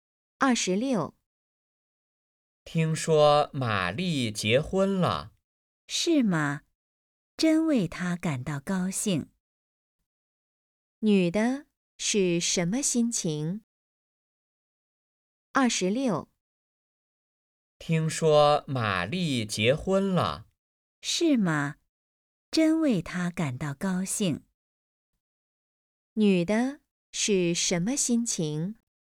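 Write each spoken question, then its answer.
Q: 女的是什么心情?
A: 高兴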